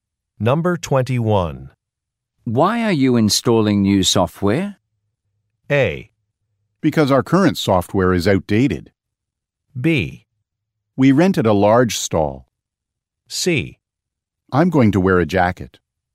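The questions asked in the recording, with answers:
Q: Why are you installing new software?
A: A: because our current software is outdated.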